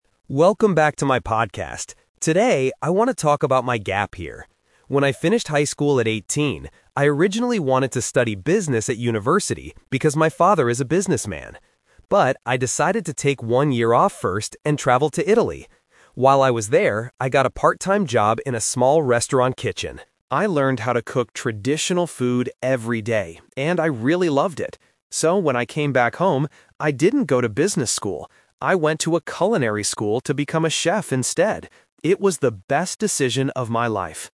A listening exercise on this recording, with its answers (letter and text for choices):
Listen to a podcast host talking about his gap year. For each question, choose the correct answer (A, B, or C).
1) What did the speaker originally want to study at university?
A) Italian language.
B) Cooking.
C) Business.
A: C) Business.

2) What did the speaker do during his gap year?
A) He worked in a restaurant.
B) He started a new business.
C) He worked with his father.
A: A) He worked in a restaurant.

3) What did the speaker actually do when he returned home?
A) He went to business school.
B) He went to culinary school to be a chef.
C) He opened a restaurant in Italy.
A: B) He went to culinary school to be a chef.

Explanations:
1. The speaker explicitly says, "I originally wanted to study Business at university" (Option C - Key). Option A is a trap because he traveled to Italy, but he didn't study the language. Option B is a trap because cooking is what he decided to do later.
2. He says that in Italy, "I got a part-time job in a small restaurant kitchen" (Option A - Key). Option B is a trap because "business" is mentioned in the audio, but he didn't start one. Option C is wrong because his father was the reason he initially wanted to study business, not the person he worked with.
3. The speaker says he didn't go to business school (Option A - Trap). Instead, because he loved cooking in Italy, he "went to a culinary school to become a chef instead" (Option B - Key). Option C is a trap combining "restaurant" and "Italy", but he went to school at home, not opened a restaurant in Italy.

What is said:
Podcast Host: Welcome back to my podcast! Today, I want to talk about my gap year. When I finished high school at 18, I originally wanted to study Business at university because my father is a businessman. But, I decided to take one year off first and traveled to Italy. While I was there, I got a part-time job in a small restaurant kitchen. I learned how to cook traditional food every day and I really loved it. So, when I came back home, I didn't go to business school. I went to a culinary school to become a chef instead. It was the best decision of my life.